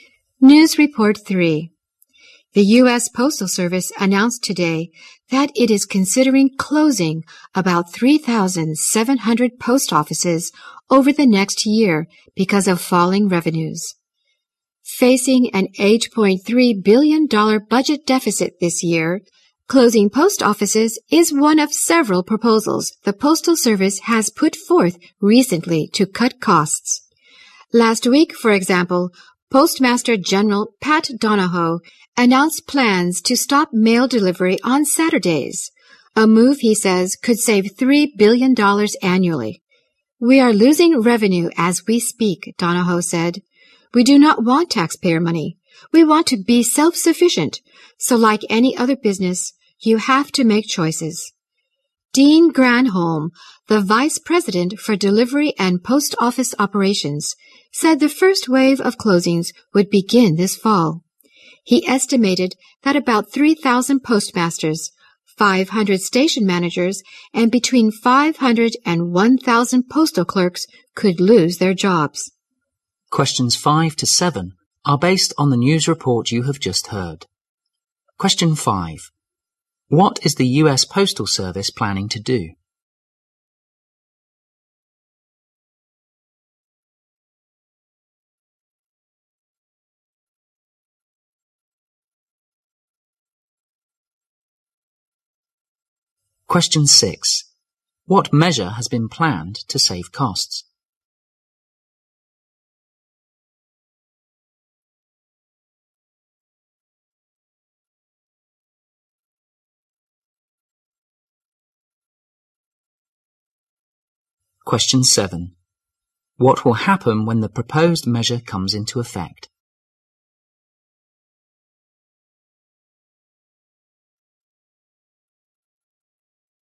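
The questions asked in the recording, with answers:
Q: What is the U.S. Postal Service planning to do?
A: Close about 3,700 post offices

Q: What measure has been planned to save costs?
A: Stop mail delivery on Saturdays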